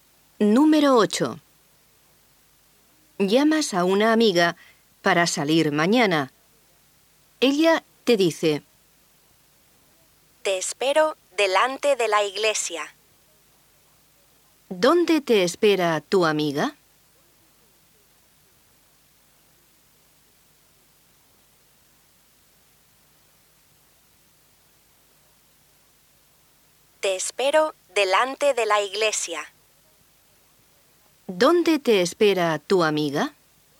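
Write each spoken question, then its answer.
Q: ¿Dónde te espera tu amiga?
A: Delante de la iglesia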